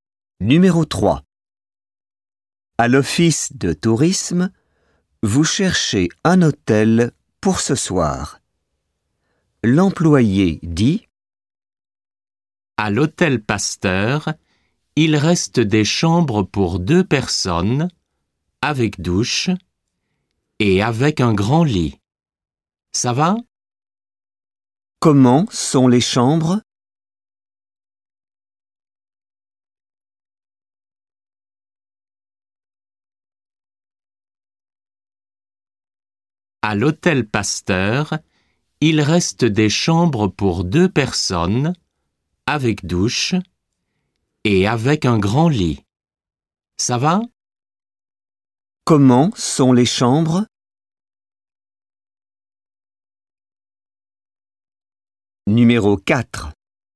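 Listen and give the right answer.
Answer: Pour deux personnes, avec douche et un grand lit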